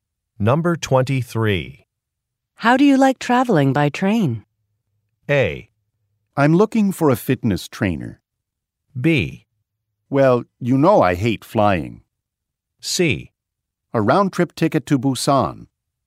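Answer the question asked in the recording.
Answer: B: Well, you know I hate flying.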